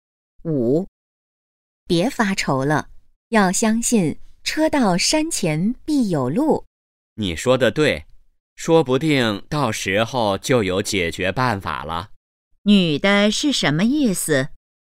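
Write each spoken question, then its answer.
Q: 女的是什么意思?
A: 到时候可能就有解决办法了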